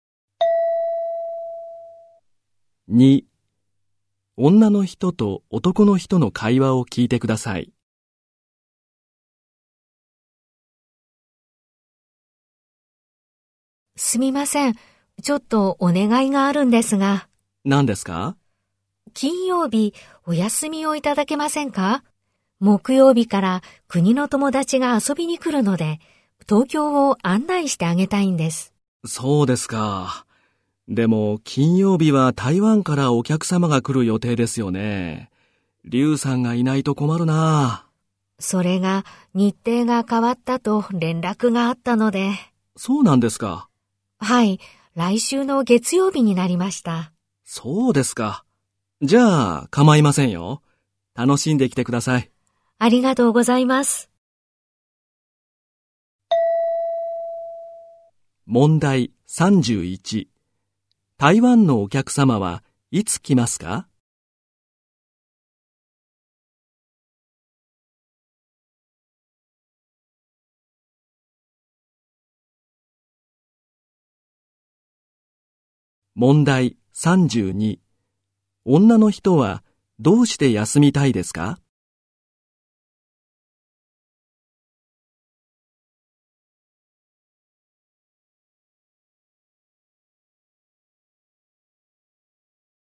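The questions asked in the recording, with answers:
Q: 台湾のお客様はいつ来ますか?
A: 来週の月曜日

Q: 女の人はどうして休みたいですか?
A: 国から来る友達に東京を案内したいから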